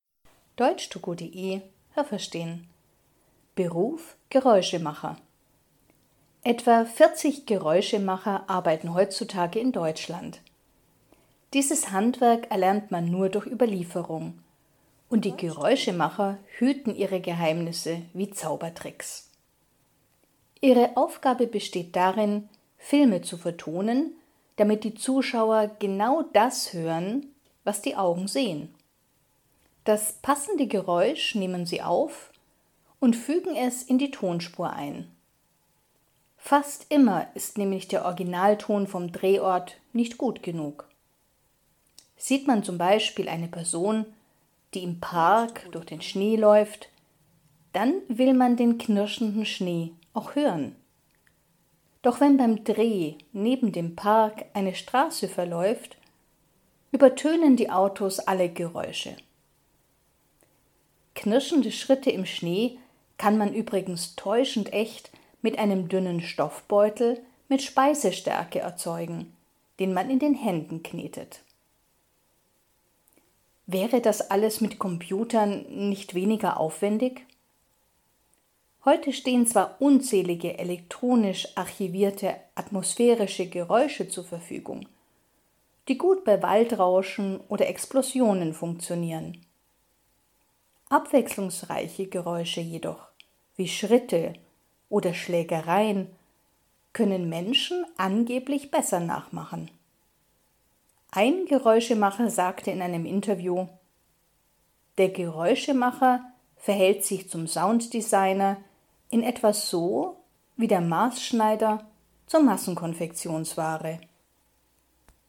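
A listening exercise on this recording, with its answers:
Haben Sie das gehört? Stimmt diese Aussage?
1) Die 40 Geräuschemacher in Deutschland machen ihre Ausbildung gemeinsam mit Zauberern.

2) Geräuschemacher unterlegen einen Film mit Geräuschen.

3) Der Originalton eines Films entspricht fast nie dem, was der Zuschauer sieht.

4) Das Geräusch von knirschendem Schnee imitiert man am besten mit Speiseresten in einem Stoffbeutel, den man in der Hand schüttelt.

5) Mit dem Computer kann man alle Geräusche viel einfacher erzeugen.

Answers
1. Nein, das habe ich nicht gehört.
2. Ja, das habe ich gehört.
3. Ja, das habe ich gehört.
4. Nein, das habe ich nicht gehört.
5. Nein, das habe ich nicht gehört.

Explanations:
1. Geräuschemacher durchlaufen überhaupt keine Ausbildung. Sie lernen ihr Handwerk nur durch Überlieferung.
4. Man muss Speisestärke in einen Stoffbeutel geben und ihn mit der Hand kneten.
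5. Bei atmosphärischen Geräuschen stimmt das, aber nicht bei abwechslungsreichen Geräuschen.

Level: C2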